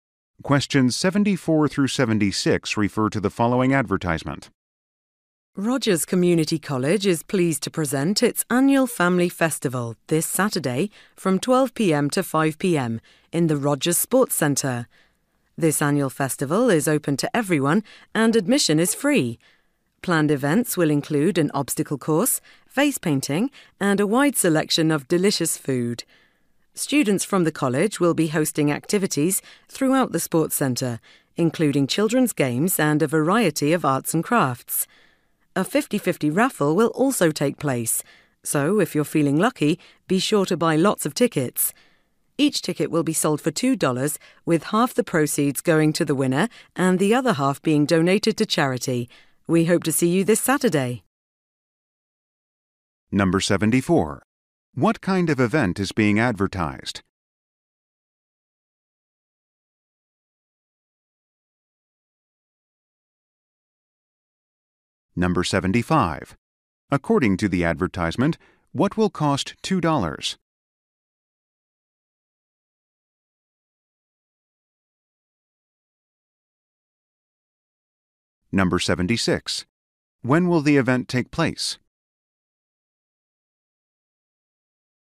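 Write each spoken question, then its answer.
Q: What kind of event is being advertised?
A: An annual family festival

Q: According to the advertisement, what will cost $2?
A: A raffle ticket

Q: When will the event take place?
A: This Saturday, 12 p.m. to 5 p.m.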